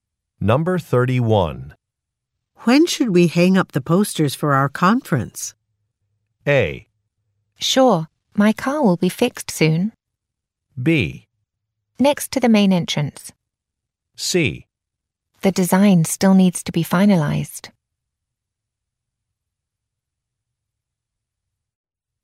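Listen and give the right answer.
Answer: C: The design still needs to be finalized.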